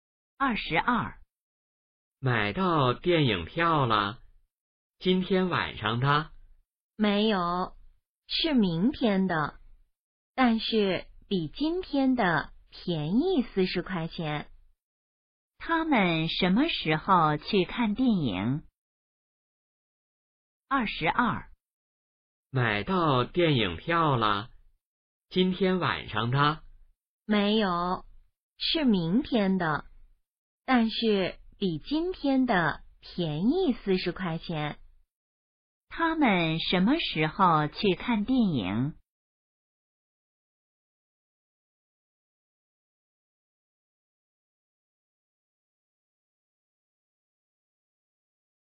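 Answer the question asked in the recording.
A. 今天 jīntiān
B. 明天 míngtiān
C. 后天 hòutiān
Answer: B. 明天 míngtiān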